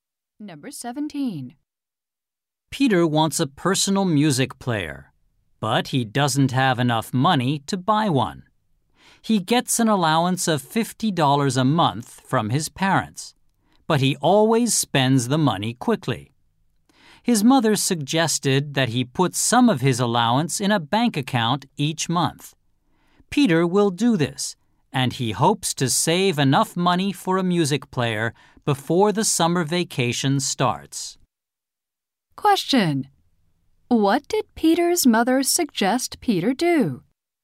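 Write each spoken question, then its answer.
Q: What did Peter's mother suggest Peter do?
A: Put some of his allowance in a bank account each month.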